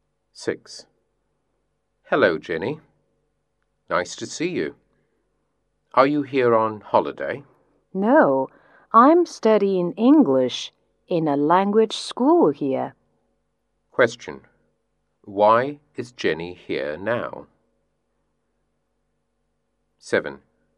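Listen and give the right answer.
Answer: To study English in a language school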